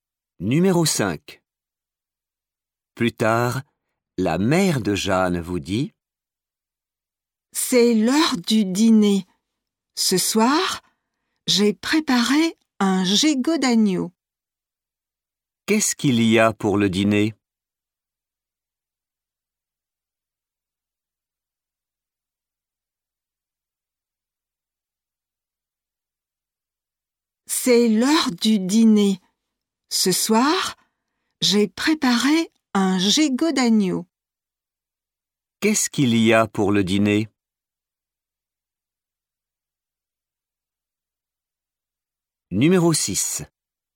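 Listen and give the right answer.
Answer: un gigot d'agneau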